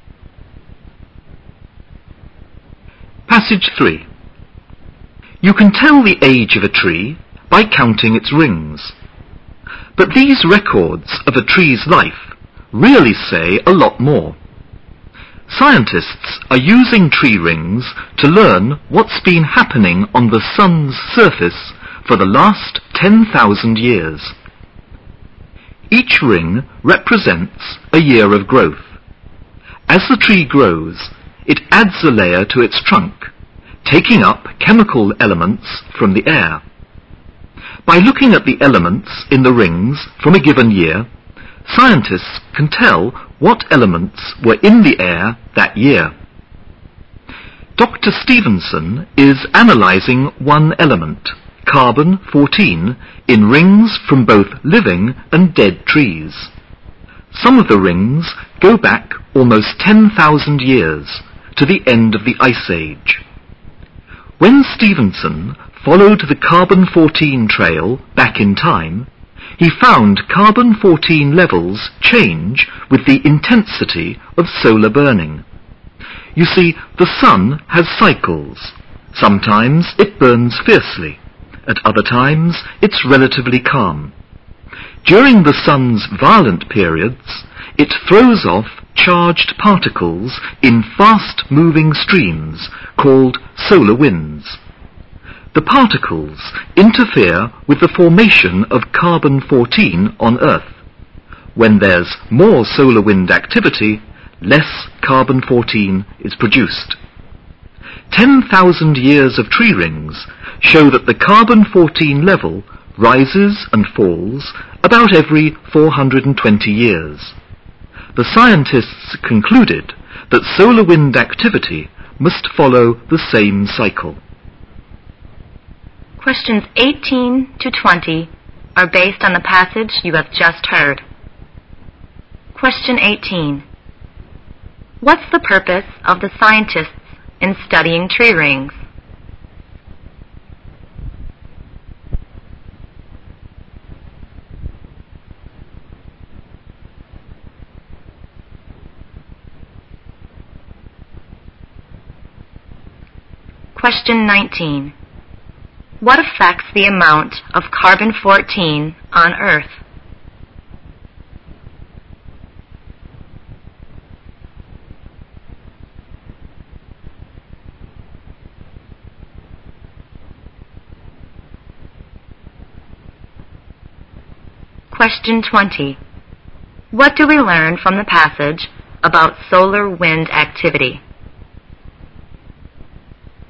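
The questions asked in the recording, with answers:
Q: What's the purpose of the scientists in studying tree rings?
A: To learn about activity on the sun's surface

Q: What affects the amount of carbon-14 on Earth?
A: Solar wind activity

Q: What do we learn from the passage about solar wind activity?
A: It follows a cycle of about 420 years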